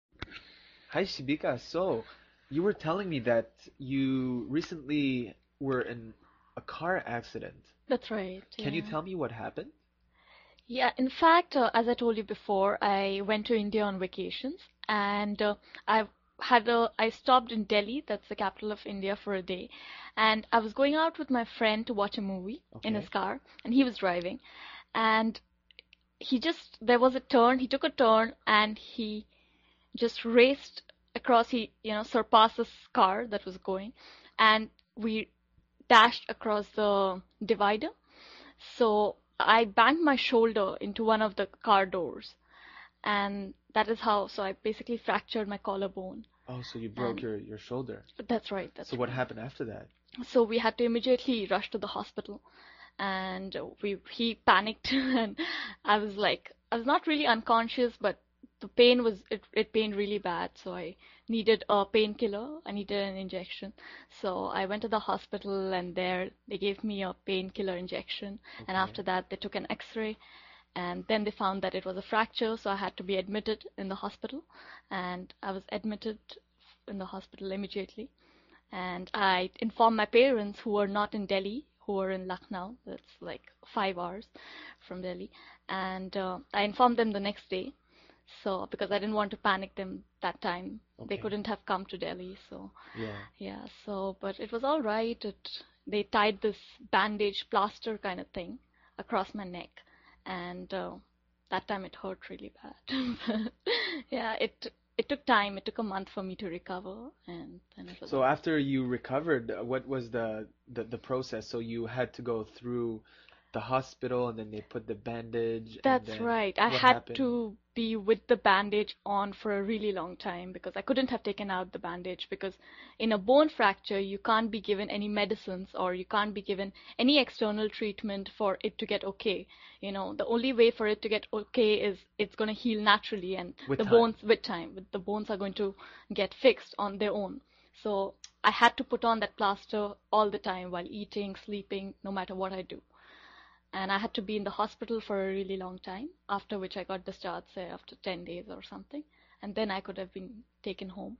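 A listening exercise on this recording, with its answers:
用 1-2 句话用自己的话回答下面的问题。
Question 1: Where did Shibika stop for a day during her vacation in India, and what was she doing with her friend when the accident happened?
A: In Delhi; she was going to watch a movie in her friend's car while he drove.

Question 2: What exactly was Shibika's injury, and how did she get it?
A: A fractured collarbone; she banged her shoulder into a car door when they crashed into the divider.

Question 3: Where were Shibika's parents at the time of the accident, and why did she wait until the next day to inform them?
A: In Lucknow, five hours from Delhi; she didn't want to make them panic.

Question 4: According to Shibika, why did she have to keep the bandage/plaster on for a long time, and how long was she in the hospital before being discharged?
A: A fracture can only heal naturally with time, with no medicine or other treatment; she was in hospital for about 10 days.

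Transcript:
Hi, Shibika, so you were telling me that you recently were in a car accident.
Shibika
That's right.
Can you tell me what happened?
Shibika
Yeah, in fact, as I told you before , I went to India on vacation and I had stopped in Delhi.
ShibikaYeah, in fact, as I told you before , I went to India on vacation and I had stopped in Delhi. That's the capital of India for a day, and I was going out with my friend to watch a movie in his car and he was driving, and he just, there was a turn. He took a turn and he just raced across, He surpassed this car that was going and we dashed across the divider so I banged my shoulder into one of the car doors and that is how... so I basically fractured my collarbone.
FredOh, so you broke your shoulder.
FredWhat happened after that?
ShibikaSo, we had to immediately rush to the hospital and he panicked. I was like... I was not really unconscious but the pain was... 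it pained really bad so I needed pain killer. I needed an injection , so I went to the hospital and there they gave me a pain killer injection and after that they took an x-ray and then they found it was a fracture so I had to be admitted in the hospital and I was admitted in the hospital immediately and I informed my parents who were not in Delhi, who were in Lucknow. It's like five hours from Delhi and I informed them the next day so... because I didn't want to panic them that time. They couldn't have come to Delhi so. Yeah, so but it was alright. They tied this bandage, plaster kind of thing across my neck and that time it hurt really bad. Yeah, it took time to for me to recover.
FredSo, after you recovered, what was the process. So you had to go through the hospital and then they put the bandage.
I had to be with the bandage on for a really long time, because I couldn't have taken out the bandage because in a bone fracture you can't be given any medicines or you can't be given any external treatment for it to get OK. 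You know, the only was for it to get OK is it's gonna heal naturally and with the bones with time. The bones are going to get fixed on their own so I had to on that plaster all the time, while eating, sleeping, no matter what I do, and I had to be in the hospital for a really long time after which I got discharged, say after ten days or something, and then I could have been taken home.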